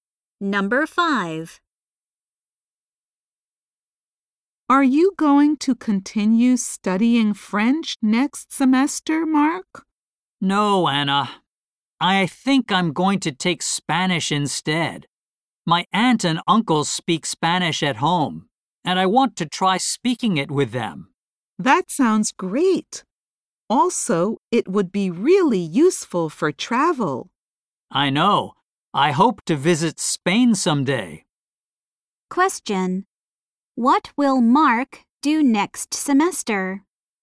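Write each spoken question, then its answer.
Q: What will Mark do next semester?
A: Take Spanish instead of French.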